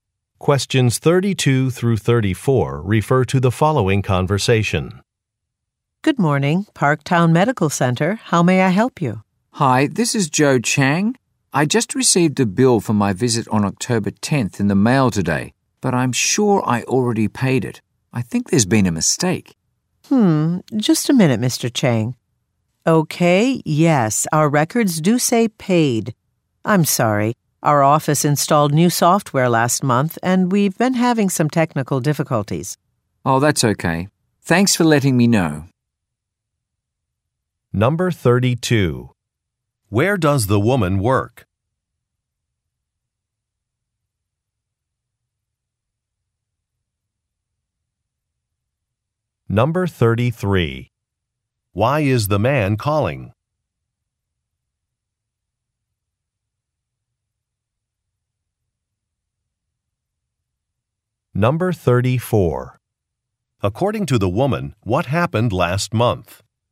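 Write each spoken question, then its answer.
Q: Where does the woman work?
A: At a medical center

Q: Why is the man calling?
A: He received a bill he already paid

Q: According to the woman, what happened last month?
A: New software was installed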